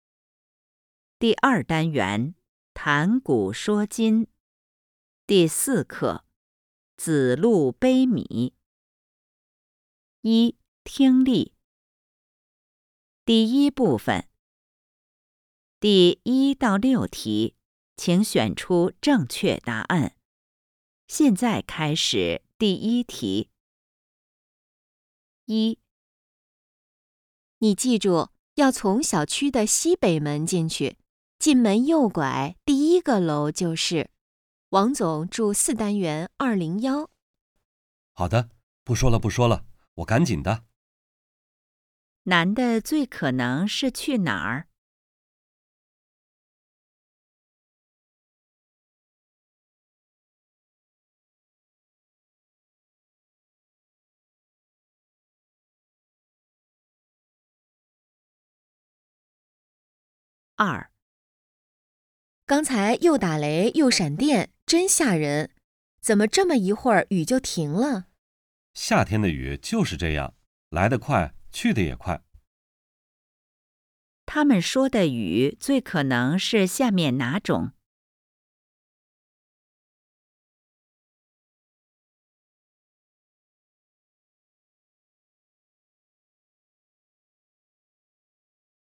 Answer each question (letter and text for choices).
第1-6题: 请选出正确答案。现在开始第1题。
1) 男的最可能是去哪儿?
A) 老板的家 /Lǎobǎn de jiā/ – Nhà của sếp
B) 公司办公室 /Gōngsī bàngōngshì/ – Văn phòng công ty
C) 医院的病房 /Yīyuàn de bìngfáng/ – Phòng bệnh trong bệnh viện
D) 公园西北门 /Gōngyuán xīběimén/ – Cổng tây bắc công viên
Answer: A) 老板的家 /Lǎobǎn de jiā/ – Nhà của sếp

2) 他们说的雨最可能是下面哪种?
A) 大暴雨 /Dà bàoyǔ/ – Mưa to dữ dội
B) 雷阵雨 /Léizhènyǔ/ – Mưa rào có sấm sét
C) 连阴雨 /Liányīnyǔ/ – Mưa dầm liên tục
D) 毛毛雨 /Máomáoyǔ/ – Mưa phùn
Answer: B) 雷阵雨 /Léizhènyǔ/ – Mưa rào có sấm sét

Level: HSK 5